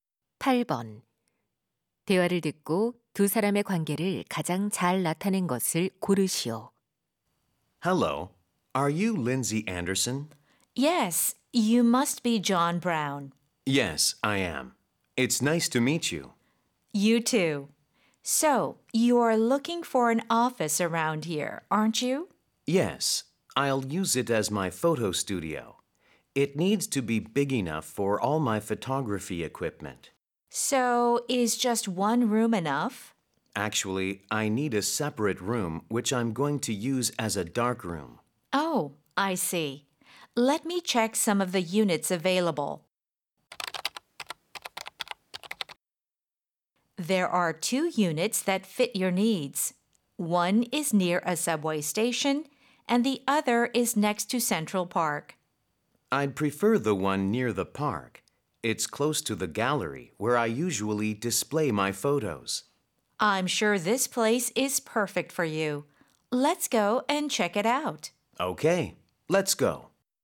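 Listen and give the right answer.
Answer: 사진작가 - 부동산 중개인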